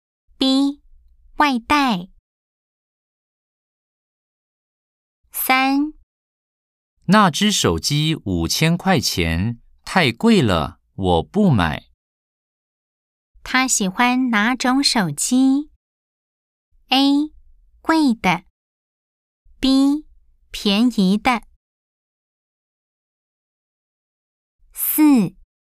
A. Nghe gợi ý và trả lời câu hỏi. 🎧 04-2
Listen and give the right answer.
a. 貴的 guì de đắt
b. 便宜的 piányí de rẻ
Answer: b. 便宜的 piányí de rẻ